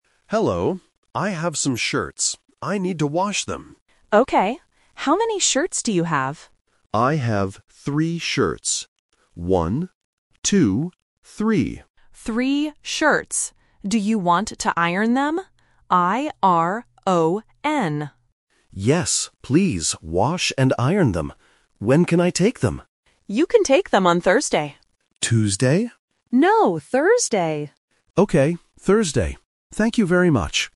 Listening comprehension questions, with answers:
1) How many shirts does the customer have?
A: 3

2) What word does the worker spell?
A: I-R-O-N

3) When can the customer take the shirts?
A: On Thursday